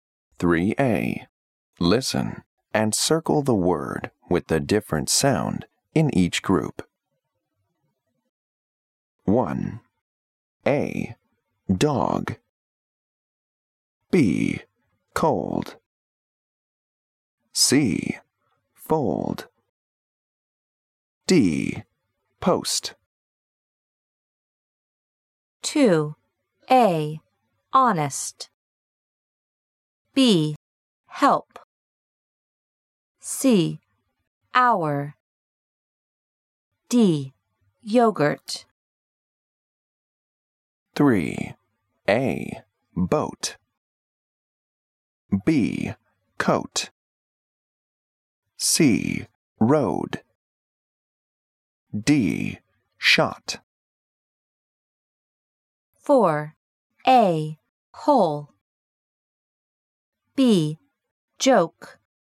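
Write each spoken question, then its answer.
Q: 1. A. Dog. B. Cold. C. Fold. D. Post.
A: A: Dog

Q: 3. A. Boat. B. Coat. C. Road. D. Shot.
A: D: Shot

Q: 4. A. Hole. B. Joke. C. Rose. D. Box.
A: D: Box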